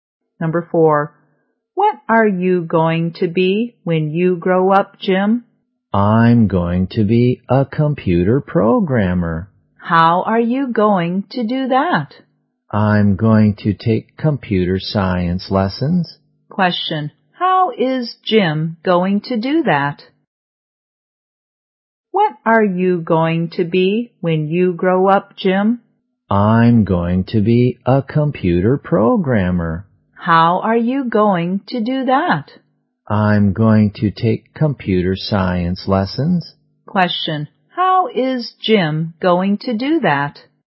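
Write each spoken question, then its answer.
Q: how is Jim going to do that?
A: By taking computer science lessons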